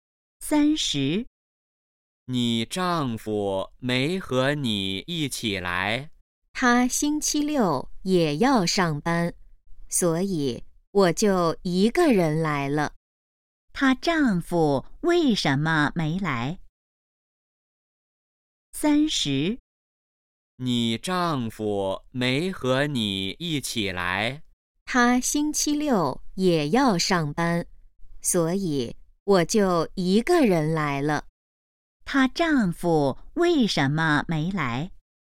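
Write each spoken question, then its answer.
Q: 他丈夫为什么没来?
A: 星期六要上班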